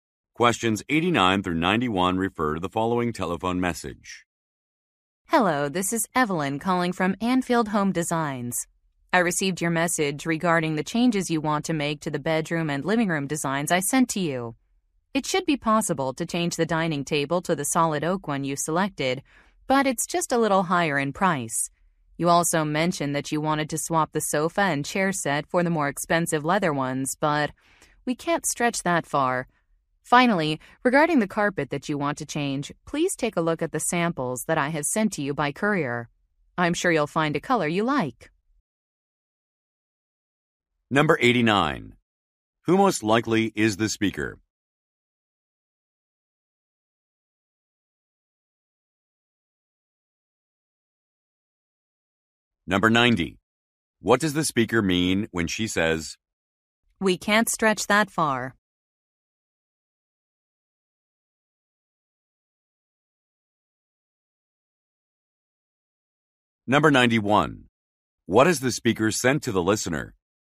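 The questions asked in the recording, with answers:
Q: Who most likely is the speaker?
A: An interior designer

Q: What has the speaker sent to the listener?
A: Carpet samples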